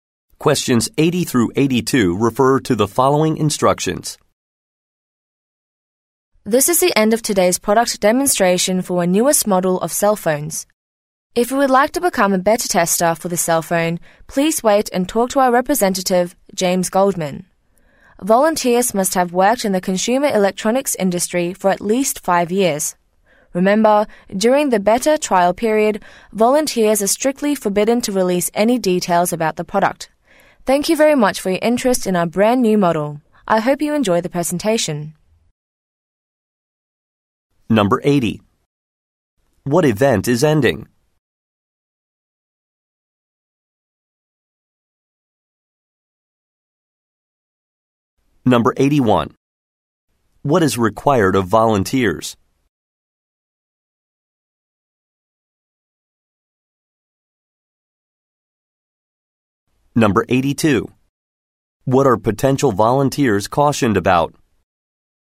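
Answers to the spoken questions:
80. A product demonstration
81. At least 5 years in the consumer electronics industry
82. Not releasing any product details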